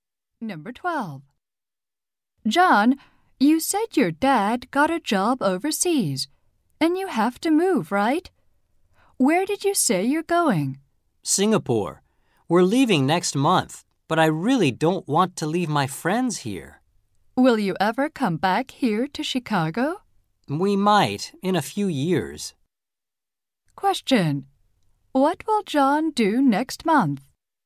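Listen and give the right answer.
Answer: Move to Singapore.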